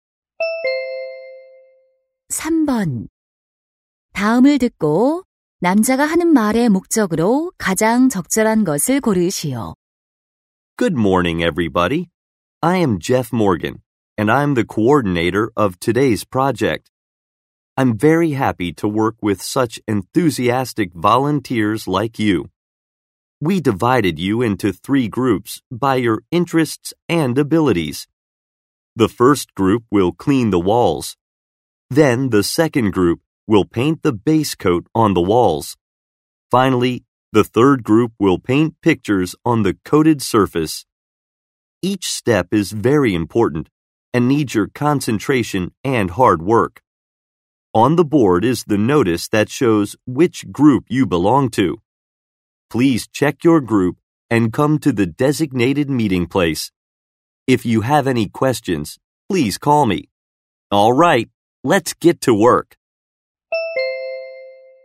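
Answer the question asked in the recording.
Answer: 봉사자들에게 조별 작업 내용과 모일 장소 확인을 안내하려고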